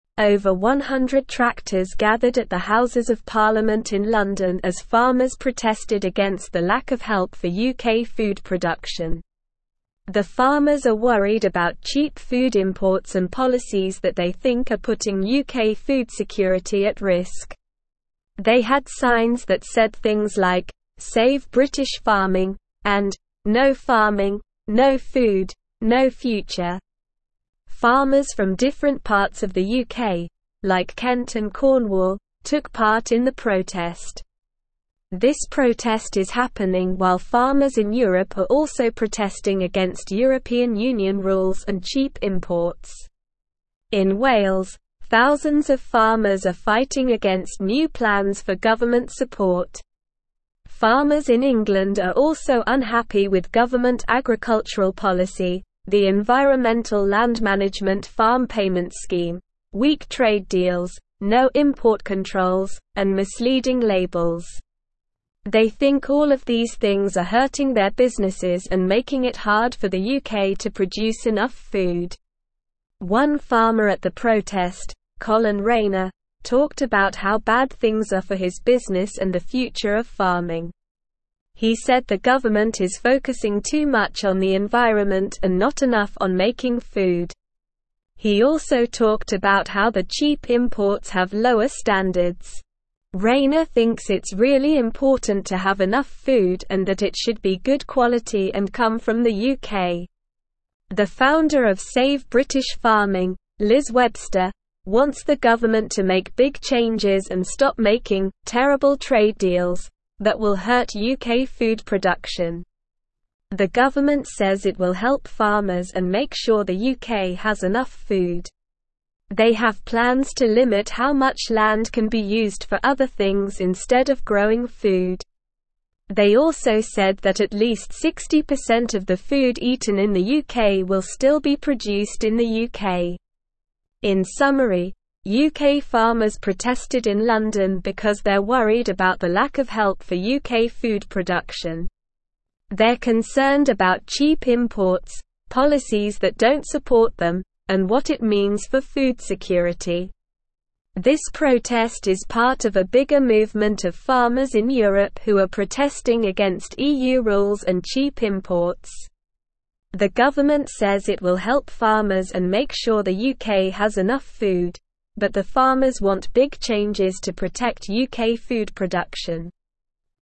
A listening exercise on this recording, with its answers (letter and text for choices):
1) Why did farmers gather at the Houses of Parliament in London?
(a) To support government agricultural policy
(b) To protest against the lack of help for UK food production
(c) To advocate for cheap food imports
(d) To discuss new plans for government support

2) What are UK farmers worried about?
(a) Lack of government support for the environment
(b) Weak trade deals and import controls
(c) Cheap food imports and policies that put UK food security at risk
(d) Misleading labels and lower standards for food imports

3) Where did the farmers at the protest come from?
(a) Different parts of the UK, like Kent and Cornwall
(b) European countries like France and Germany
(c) Wales and England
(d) London and Paris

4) What does Colin Rayner think the government is focusing too much on?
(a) Making food and not enough on the environment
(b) The environment and not enough on making food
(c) European Union rules and cheap imports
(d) Weak trade deals and import controls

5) What does Liz Webster want the government to do?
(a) Support EU rules and cheap imports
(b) Focus on the environment instead of making food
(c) Limit how much land can be used for other things instead of growing food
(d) Make big changes and stop making "terrible trade deals"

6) What plans does the government have to help farmers?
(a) Increase cheap food imports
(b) Decrease government support for agriculture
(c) Limit how much land can be used for other things instead of growing food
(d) Ensure at least 60% of the food eaten in the UK is produced in the UK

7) What is the main concern of the farmers at the protest?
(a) The government's focus on the environment instead of making food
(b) The impact of EU rules and cheap imports on UK farmers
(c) The need for big changes to protect UK food production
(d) The lack of help for UK food production and its impact on food security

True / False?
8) Farmers in England are satisfied with government agricultural policy, strong trade deals, and accurate labels.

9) Farmers from different parts of the UK, like Kent and Cornwall, participated in the protest.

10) The founder of Save British Farming, Liz Webster, does not want the government to make significant changes to protect UK food production.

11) One farmer at the protest, Colin Rayner, expressed concerns about the future of farming and the lower standards of cheap imports.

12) Farmers in Europe are also protesting against European Union rules and cheap imports.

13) In Wales, thousands of farmers are fighting against new government plans for support.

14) Over 100 tractors gathered at the Houses of Parliament in London as farmers celebrated the support for UK food production.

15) The farmers are not concerned about cheap food imports and policies that they believe are endangering UK food security.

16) Over 100 tractors gathered at the (1)______ of Parliament in London as (2)______ protested against the lack of help for UK food production.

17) Over 100 tractors gathered at the (1)______ of Parliament in London as (2)______ protested against the lack of help for UK food production.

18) Farmers in England are also unhappy with government agricultural policy, the Environmental Land (5)______ farm payments scheme, weak (6)______ deals, no (7)______ controls, and (8)______ labels.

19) Farmers in England are also unhappy with government agricultural policy, the Environmental Land (5)______ farm payments scheme, weak (6)______ deals, no (7)______ controls, and (8)______ labels.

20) Farmers in England are also unhappy with government agricultural policy, the Environmental Land (5)______ farm payments scheme, weak (6)______ deals, no (7)______ controls, and (8)______ labels.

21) Farmers in England are also unhappy with government agricultural policy, the Environmental Land (5)______ farm payments scheme, weak (6)______ deals, no (7)______ controls, and (8)______ labels.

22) The founder of Save British Farming, Liz Webster, (9)______ the government to make big changes and stop making "terrible trade deals" that will hurt UK food (10)______.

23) The founder of Save British Farming, Liz Webster, (9)______ the government to make big changes and stop making "terrible trade deals" that will hurt UK food (10)______.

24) They have plans to (11)______ how much land can be used for other things instead of (12)______ food.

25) They have plans to (11)______ how much land can be used for other things instead of (12)______ food.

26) They're (13)______ about (14)______ (15)______, policies that don't support them, and what it means for food security.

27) They're (13)______ about (14)______ (15)______, policies that don't support them, and what it means for food security.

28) They're (13)______ about (14)______ (15)______, policies that don't support them, and what it means for food security.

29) This protest is part of a (16)______ movement of farmers in Europe who are protesting against EU rules and cheap imports.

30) Why did over 100 tractors gather at the Houses of Parliament in London?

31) What are the farmers worried about in terms of food production in the UK?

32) What signs did the farmers have at the protest?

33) Which parts of the UK did the farmers come from?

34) What are some specific things that farmers in England are unhappy with?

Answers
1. (b) To protest against the lack of help for UK food production
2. (c) Cheap food imports and policies that put UK food security at risk
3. (a) Different parts of the UK, like Kent and Cornwall
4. (b) The environment and not enough on making food
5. (d) Make big changes and stop making "terrible trade deals"
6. (c) Limit how much land can be used for other things instead of growing food
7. (d) The lack of help for UK food production and its impact on food security
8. False
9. True
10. False
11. True
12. True
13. True
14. False
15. False
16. Houses
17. farmers
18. Management
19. trade
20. import
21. misleading
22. wants
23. production
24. limit
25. growing
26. concerned
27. cheap
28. imports
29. bigger
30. The farmers gathered to protest against the lack of help for UK food production.
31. The farmers are worried about cheap food imports and policies that they think are putting UK food security at risk.
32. The signs said things like 'Save British farming' and 'No farming, no food, no future'.
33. Farmers from different parts of the UK, like Kent and Cornwall, took part in the protest.
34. Farmers in England are unhappy with government agricultural policy, the Environmental Land Management farm payments scheme, weak trade deals, no import controls, and misleading labels.

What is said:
Over 100 tractors gathered at the Houses of Parliament in London as farmers protested against the lack of help for UK food production. The farmers are worried about cheap food imports and policies that they think are putting UK food security at risk. They had signs that said things like 'Save British farming' and 'No farming, no food, no future'. Farmers from different parts of the UK, like Kent and Cornwall, took part in the protest.
This protest is happening while farmers in Europe are also protesting against European Union rules and cheap imports. In Wales, thousands of farmers are fighting against new plans for government support. Farmers in England are also unhappy with government agricultural policy, the Environmental Land Management farm payments scheme, weak trade deals, no import controls, and misleading labels. They think all of these things are hurting their businesses and making it hard for the UK to produce enough food.
One farmer at the protest, Colin Rayner, talked about how bad things are for his business and the future of farming. He said the government is focusing too much on the environment and not enough on making food. He also talked about how the cheap imports have lower standards. Rayner thinks it's really important to have enough food and that it should be good quality and come from the UK.
The founder of Save British Farming, Liz Webster, wants the government to make big changes and stop making "terrible trade deals" that will hurt UK food production. The government says it will help farmers and make sure the UK has enough food. They have plans to limit how much land can be used for other things instead of growing food. They also said that at least 60% of the food eaten in the UK will still be produced in the UK.
In summary, UK farmers protested in London because they're worried about the lack of help for UK food production. They're concerned about cheap imports, policies that don't support them, and what it means for food security. This protest is part of a bigger movement of farmers in Europe who are protesting against EU rules and cheap imports.

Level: Level 3